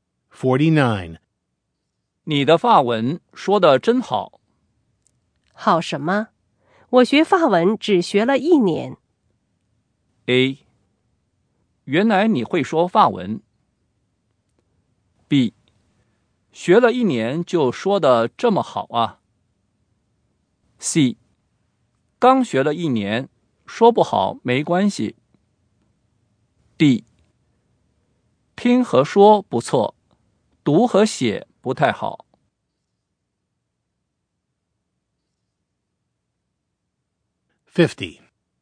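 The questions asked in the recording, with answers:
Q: 好什么?我学法文只学了一年。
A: B: 学了一年就说得这么好啊。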